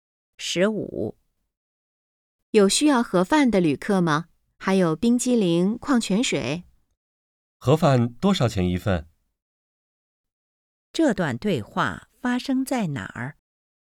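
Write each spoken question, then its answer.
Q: 这段对话发生在哪儿?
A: 火车上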